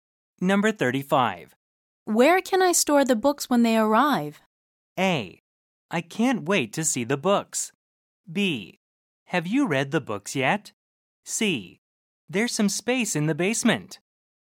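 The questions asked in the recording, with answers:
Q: Where can I store the books when they arrive?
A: C: There's some space in the basement.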